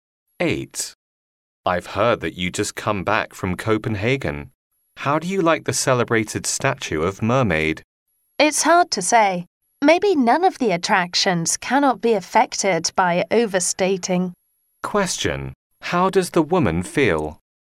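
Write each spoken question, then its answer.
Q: How does the woman feel?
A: Disappointed; the statue was overrated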